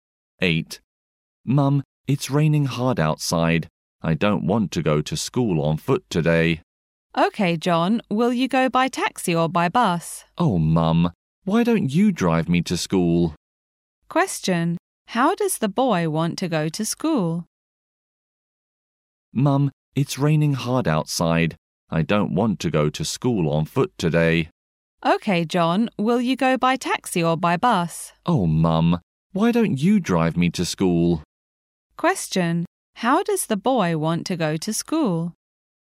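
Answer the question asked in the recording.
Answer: He wants his mum to drive him (by car).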